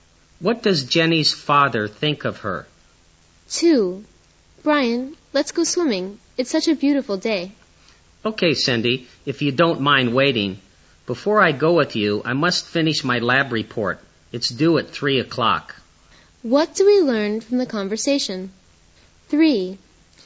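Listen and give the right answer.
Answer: Brian will go swimming after he finishes his lab report.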